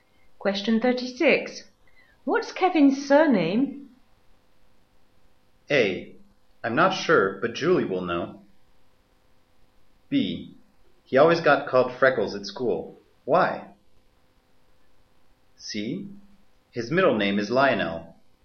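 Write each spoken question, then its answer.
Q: What's Kevin's surname?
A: A: I'm not sure, but Julie will know.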